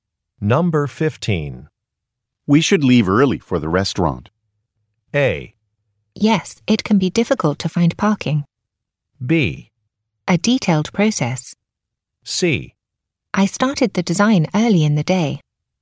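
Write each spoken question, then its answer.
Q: We should leave early for the restaurant.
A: A: Yes, it can be difficult to find parking.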